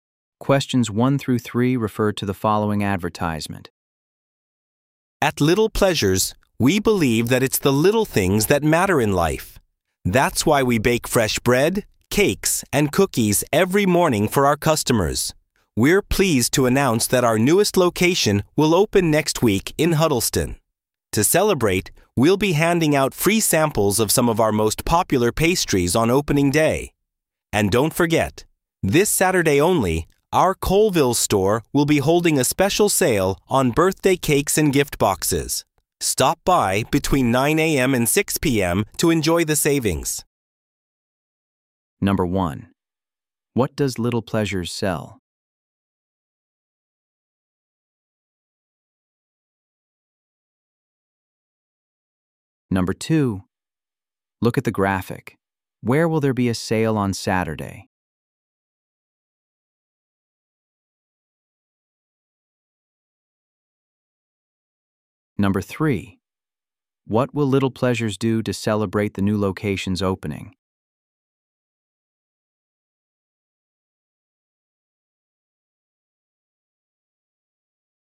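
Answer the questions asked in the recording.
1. Baked goods: bread, cakes, and cookies
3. Hand out free samples of popular pastries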